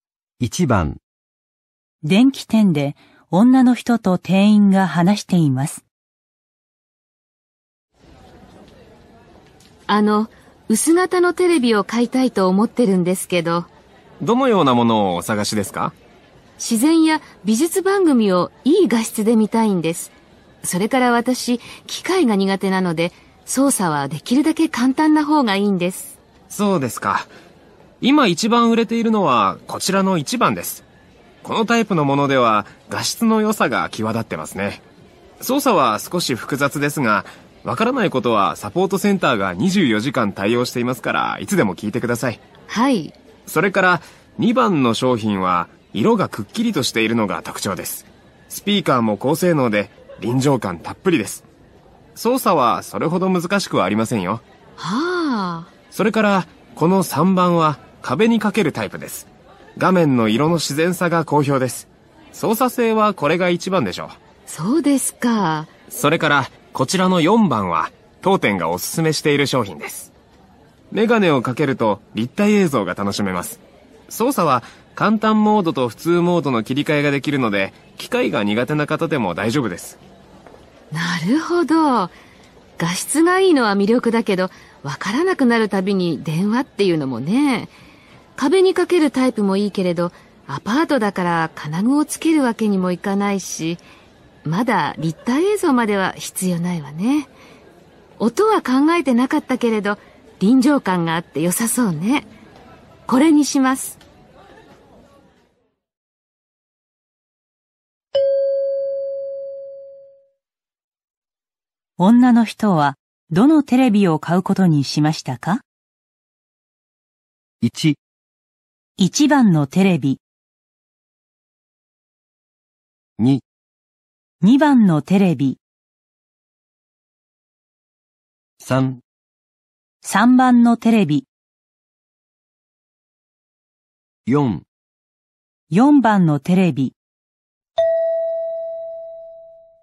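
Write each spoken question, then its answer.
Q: 女の人はどのテレビを買うことにしましたか?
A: 2: 2番のテレビ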